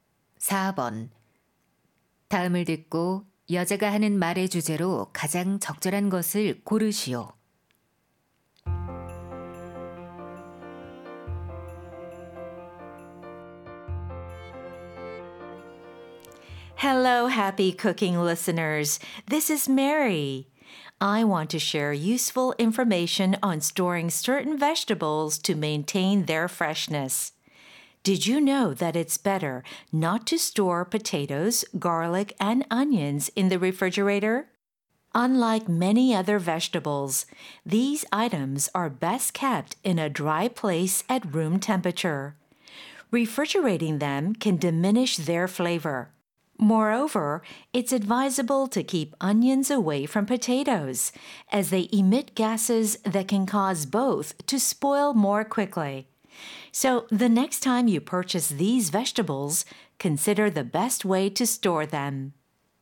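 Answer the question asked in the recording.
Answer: 특정 채소(감자, 마늘, 양파)를 신선하게 보관하는 방법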